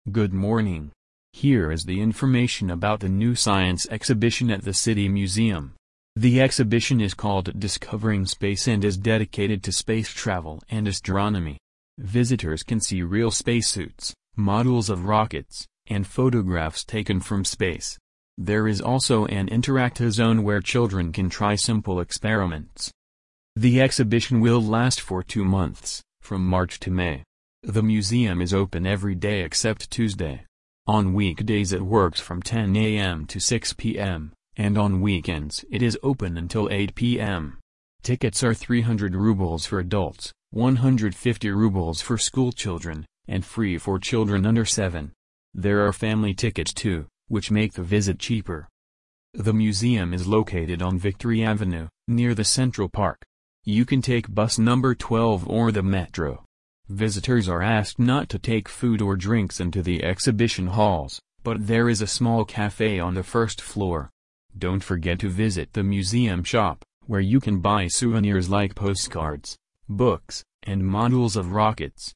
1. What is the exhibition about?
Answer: Space.

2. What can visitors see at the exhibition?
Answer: Real spacesuits and rocket models.

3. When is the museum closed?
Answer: On Tuesday.

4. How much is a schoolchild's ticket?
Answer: 150 rubles.

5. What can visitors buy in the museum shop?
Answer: Souvenirs.

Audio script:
Good morning! Here is the information about the new science exhibition at the City Museum. The exhibition is called Discovering Space and is dedicated to space travel and astronomy. Visitors can see real spacesuits, models of rockets, and photographs taken from space. There is also an interactive zone where children can try simple experiments.
The exhibition will last for two months, from March to May. The museum is open every day except Tuesday. On weekdays it works from 10 am to 6 pm, and on weekends it is open until 8 pm. Tickets are 300 rubles for adults, 150 rubles for schoolchildren, and free for children under 7. There are family tickets too, which make the visit cheaper.
The museum is located on Victory Avenue, near the central park. You can take bus number 12 or the metro. Visitors are asked not to take food or drinks into the exhibition halls, but there is a small café on the first floor. Don't forget to visit the museum shop, where you can buy souvenirs like postcards, books, and models of rockets.

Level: 8 класс